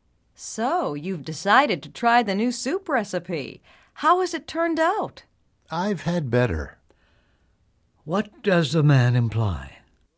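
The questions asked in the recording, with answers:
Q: What does the man imply?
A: The soup isn't very good.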